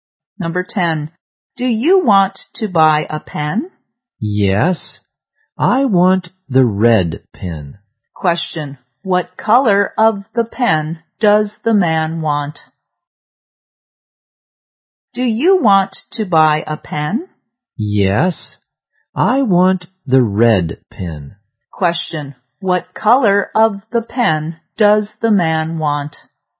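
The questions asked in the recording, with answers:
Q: Question. What color of the pen does the man want?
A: Red.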